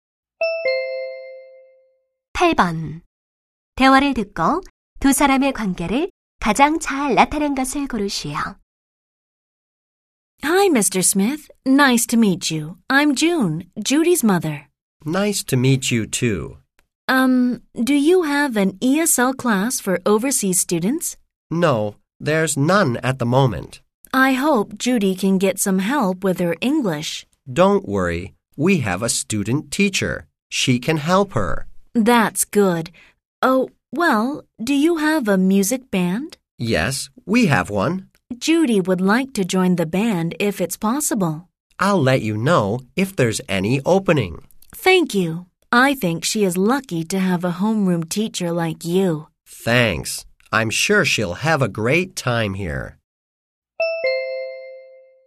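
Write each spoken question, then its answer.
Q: 대화를 듣고 두 사람의 관계를 가장 잘 나타낸 것을 고르시오.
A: 학부모와 담임 교사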